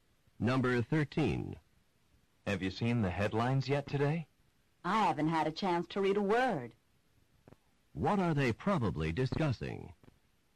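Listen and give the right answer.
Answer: The newspaper headlines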